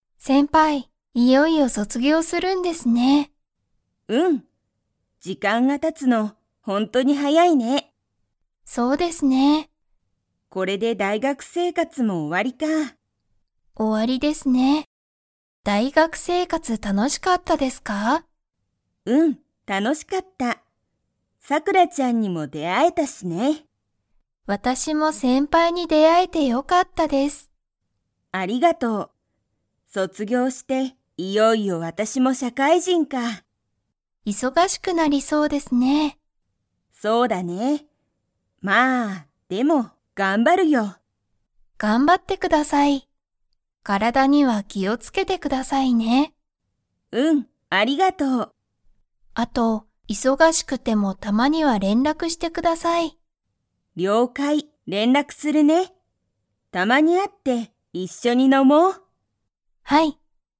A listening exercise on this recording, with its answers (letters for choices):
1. ゆきは、大学だいがく生活せいかつが楽たのしかったですか?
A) はい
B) いいえ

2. ゆきは、卒業そつぎょうしたら なりそうだ。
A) 怖こわく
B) かわいく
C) 忙いそがしく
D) 楽たのしく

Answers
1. A
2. C

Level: Level 4